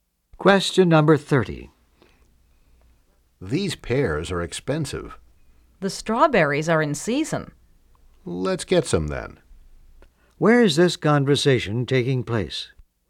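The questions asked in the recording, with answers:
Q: Where is this conversation taking place?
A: At a market or grocery store.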